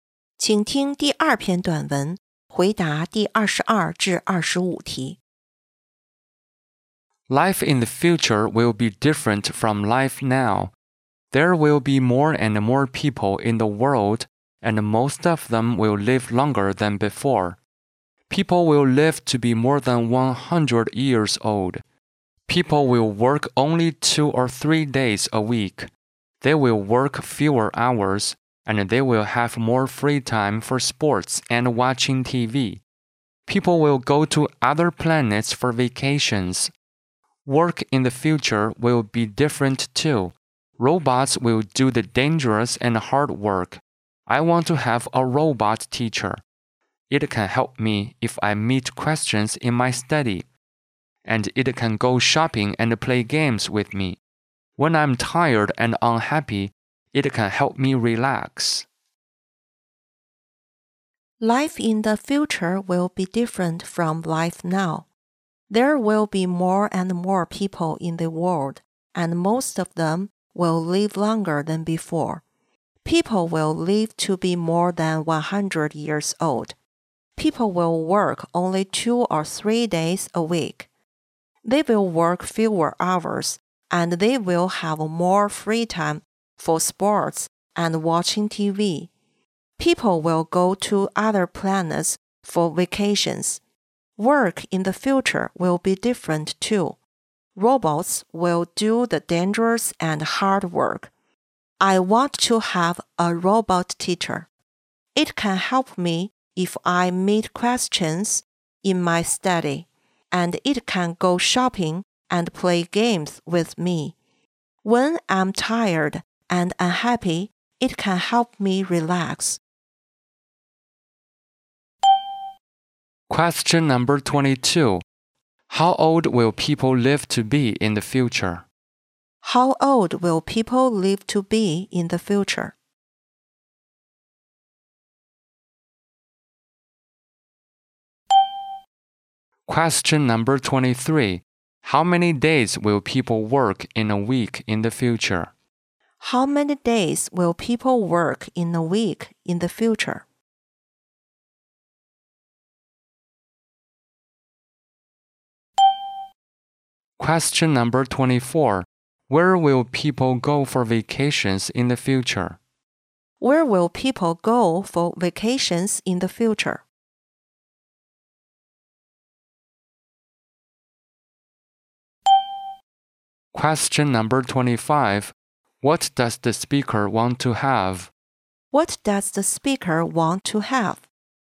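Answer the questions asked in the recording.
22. More than 100 years old
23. 2 or 3 days
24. Other planets
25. A robot teacher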